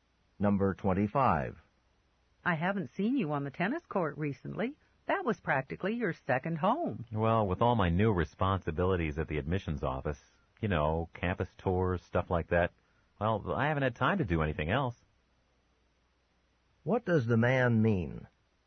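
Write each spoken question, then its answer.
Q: What does the man mean?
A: He's been too busy with his new admissions office job to play tennis.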